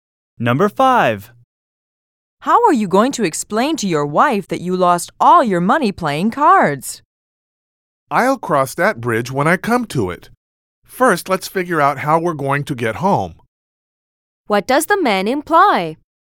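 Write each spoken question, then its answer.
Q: What does the man imply?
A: He won't worry about explaining to his wife until he has to.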